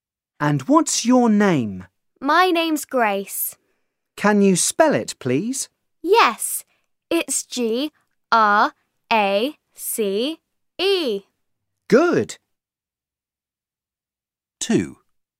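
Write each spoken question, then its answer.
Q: And what's your name?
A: Grace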